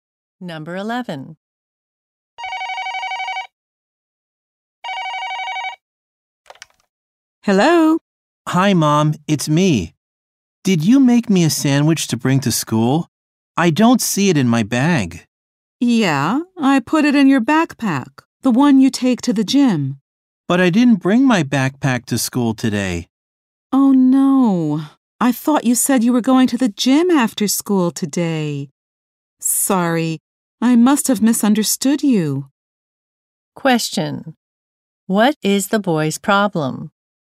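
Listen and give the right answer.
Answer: His sandwich is in the backpack he didn't bring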